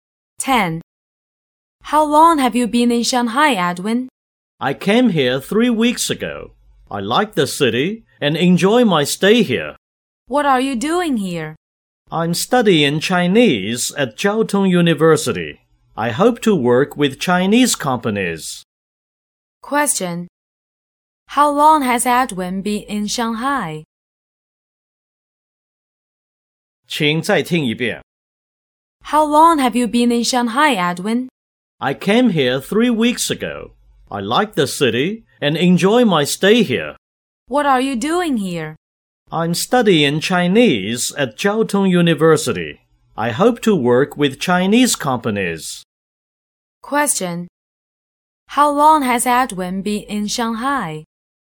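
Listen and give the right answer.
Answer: For three weeks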